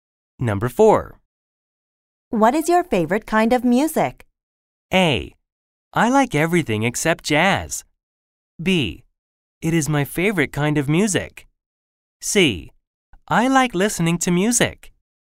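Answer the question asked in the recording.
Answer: A: I like everything except jazz.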